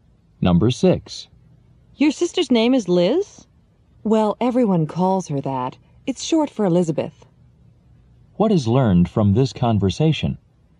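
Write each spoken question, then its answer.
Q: What is learned from this conversation?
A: Liz is a nickname; her full name is Elizabeth.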